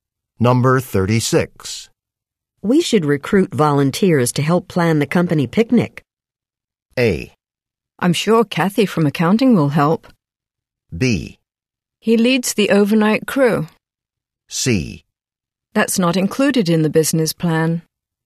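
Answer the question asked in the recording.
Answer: A: I'm sure Kathy from accounting will help.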